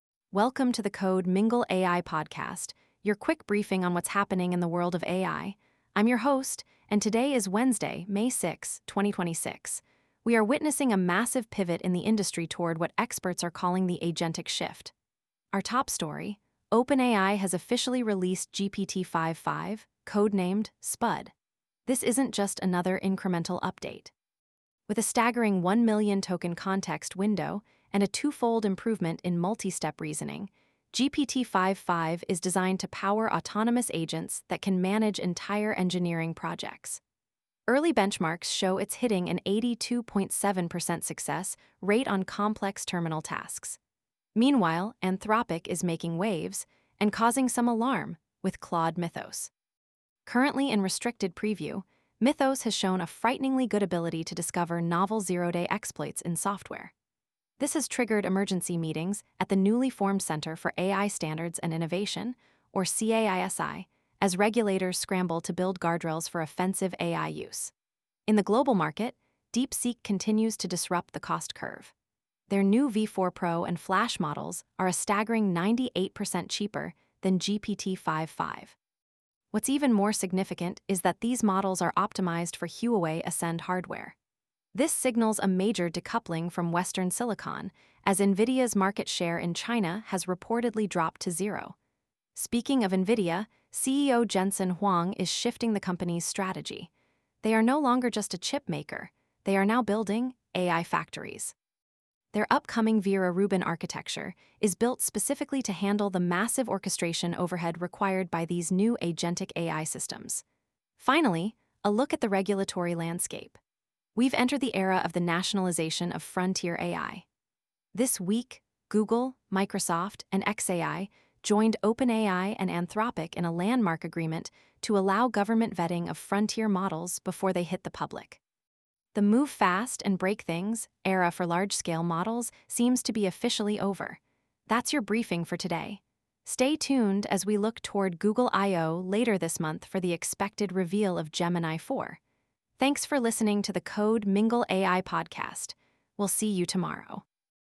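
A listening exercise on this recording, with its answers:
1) What is the context window size of OpenAI's new GPT-5.5 model?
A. 128k tokens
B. 500k tokens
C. 1 million tokens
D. 10 million tokens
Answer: 1 million tokens

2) Which Anthropic model is currently in restricted preview due to its offensive cyber capabilities?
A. Claude Opus 4.7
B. Claude Mythos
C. Claude Sonnet 5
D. Claude Haiku 4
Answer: Claude Mythos

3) DeepSeek V4 is optimized for which hardware platform?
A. NVIDIA Blackwell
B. Apple M5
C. Huawei Ascend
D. Google TPU v6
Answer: Huawei Ascend

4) What is the name of the new U.S. regulatory body overseeing AI standards?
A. NIST AI Lab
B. CAISI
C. FCC-AI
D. Department of Intelligence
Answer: CAISI

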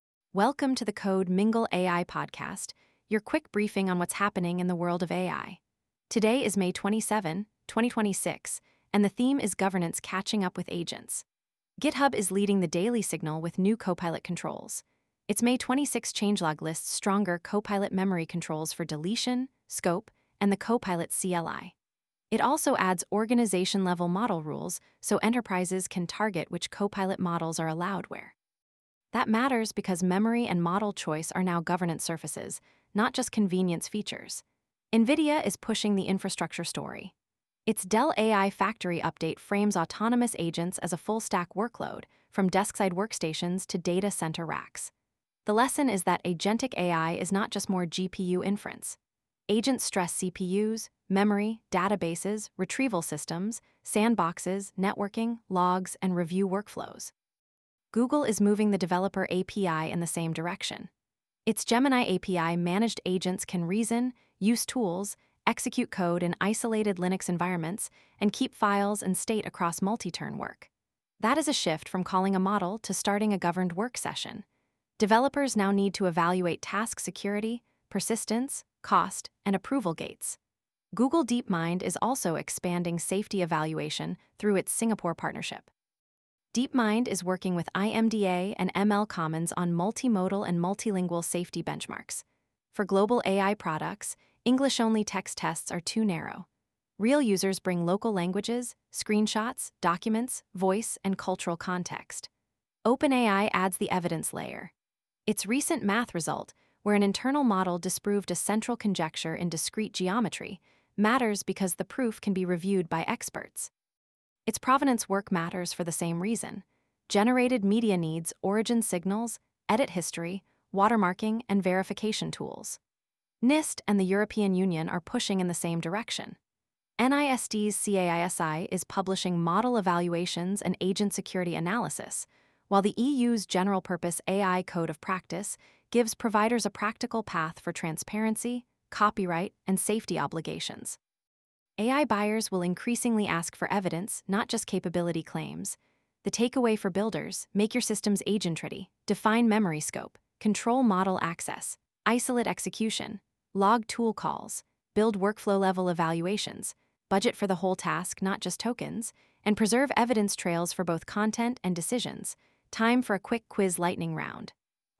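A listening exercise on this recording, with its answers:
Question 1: Why are GitHub's May 26 Copilot Memory and model-rule updates important?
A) They show memory and model choice are becoming governance surfaces for AI tools.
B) They remove the need for organization policy.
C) They make all Copilot sessions stateless.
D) They only affect classroom users.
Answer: They show memory and model choice are becoming governance surfaces for AI tools.

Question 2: What is the key infrastructure lesson from NVIDIA's Dell AI Factory update?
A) Agentic AI is only about buying more GPUs.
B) Agent workloads stress the full stack, including CPUs, memory, storage, networking, sandboxes, and observability.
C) Agents do not need enterprise data access.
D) On-premises deployment is irrelevant for regulated industries.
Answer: Agent workloads stress the full stack, including CPUs, memory, storage, networking, sandboxes, and observability.

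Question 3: What does Google's Managed Agents announcement signal for developers?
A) The API surface is shifting from single model calls toward governed, persistent work sessions.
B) Developers no longer need to evaluate security.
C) All agent state should be invisible to users.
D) Code execution should always run in production environments.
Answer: The API surface is shifting from single model calls toward governed, persistent work sessions.

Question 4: Why does Google DeepMind's Singapore safety benchmark work matter?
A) It proves English-only tests are enough.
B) It highlights the need for multilingual, multimodal, and locally relevant AI evaluations.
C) It replaces the need for model documentation.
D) It applies only to climate startups.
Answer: It highlights the need for multilingual, multimodal, and locally relevant AI evaluations.

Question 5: What common theme links OpenAI's math result, provenance work, and NIST/EU evaluation activity?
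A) Evidence trails are becoming central to trust in AI systems.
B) AI systems no longer require human review.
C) Benchmarks can replace production monitoring.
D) Generated media provenance is unrelated to AI governance.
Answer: Evidence trails are becoming central to trust in AI systems.

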